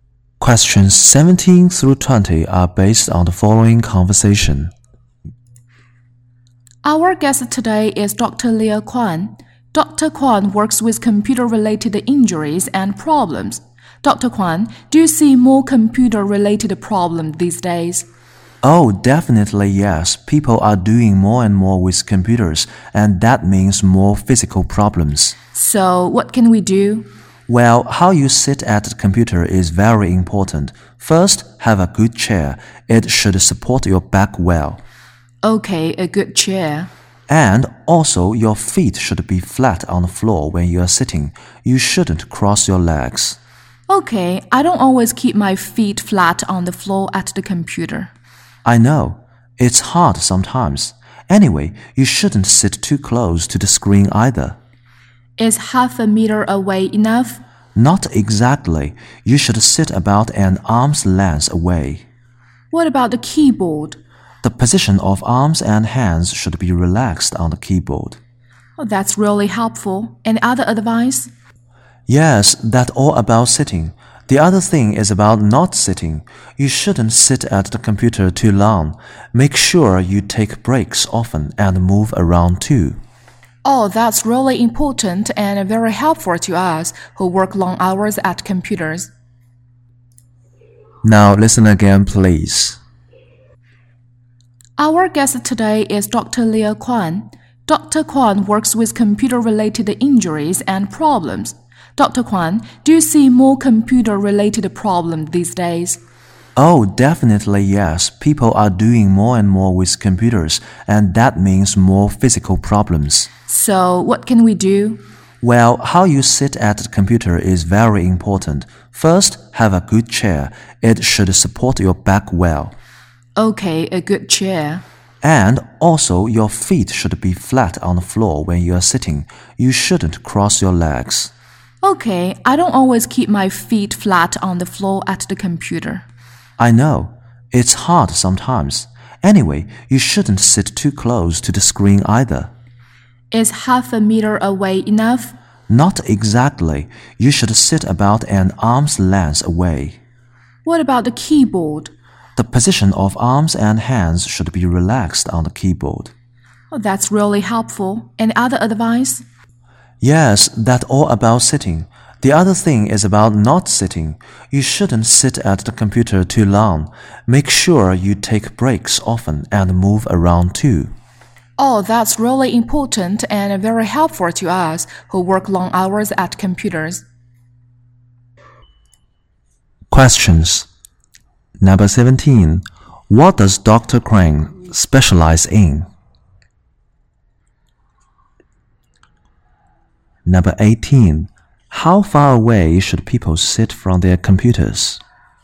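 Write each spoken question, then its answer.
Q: How far away should people sit from their computers?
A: About an arm's length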